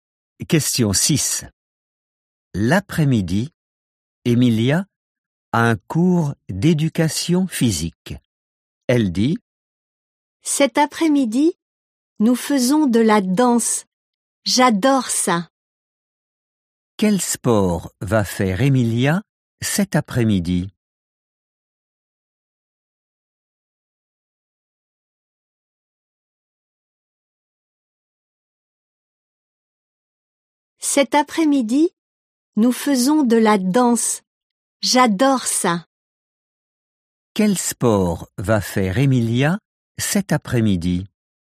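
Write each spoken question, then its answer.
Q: Quel sport va faire Emilia cet après-midi ?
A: La danse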